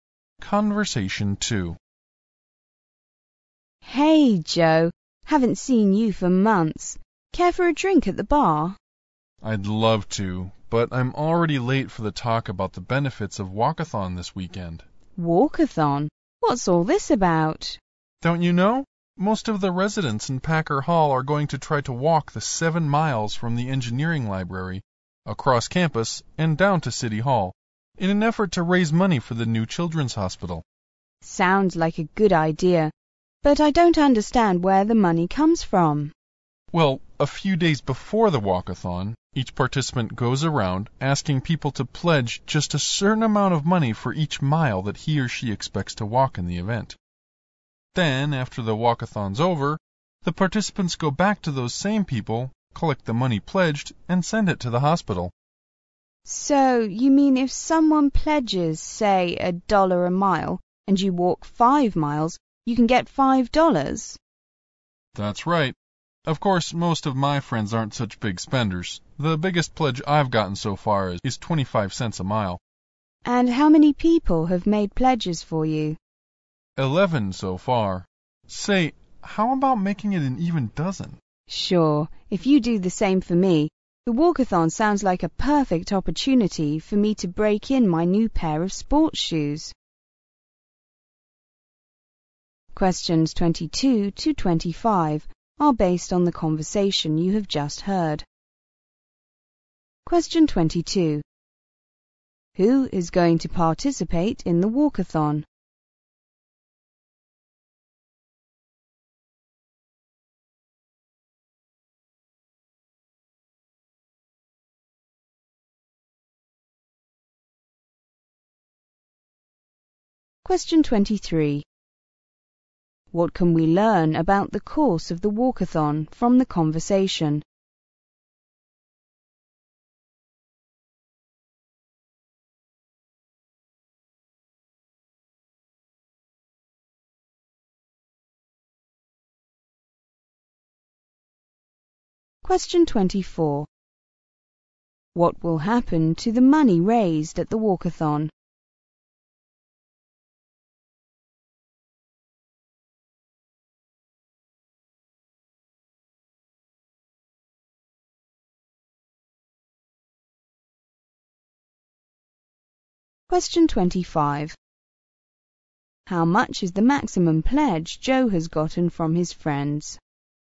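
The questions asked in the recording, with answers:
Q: Who is going to participate in the walkathon?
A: Most of the residents in Packer Hall.

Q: What can we learn about the course of the walkathon from the conversation?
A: It is 7 miles, from the engineering library across campus to City Hall.

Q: What will happen to the money raised at the walkathon?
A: It will go to the new children's hospital.

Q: How much is the maximum pledge Joe has gotten from his friends?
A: 25 cents a mile.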